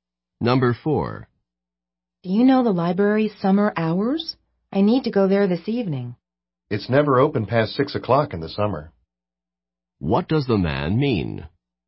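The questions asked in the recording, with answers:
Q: What does the man mean?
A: The library closes by 6 o'clock, so it won't be open this evening.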